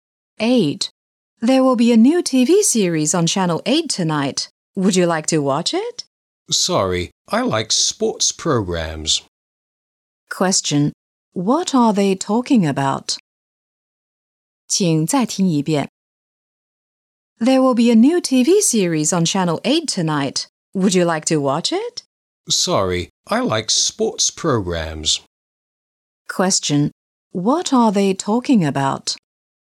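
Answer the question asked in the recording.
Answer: TV programs.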